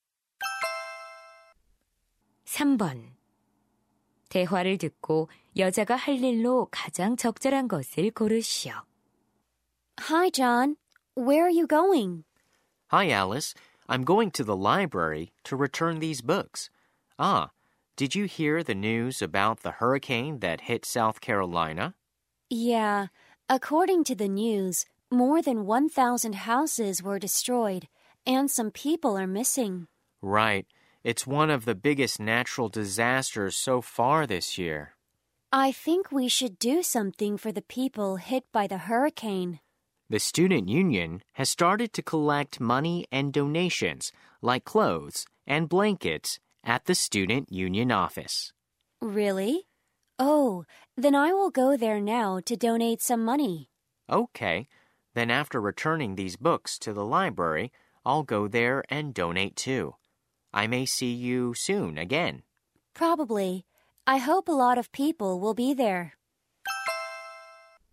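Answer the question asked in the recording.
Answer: 허리케인 피해자를 위해 돈 기부하기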